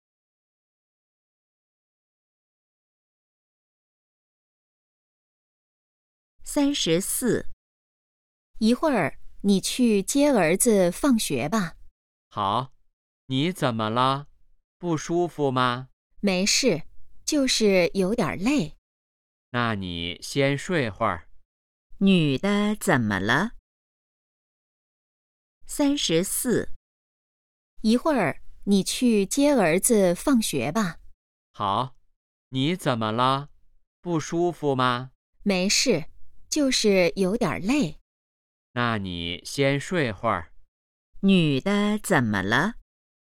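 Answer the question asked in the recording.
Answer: 有点累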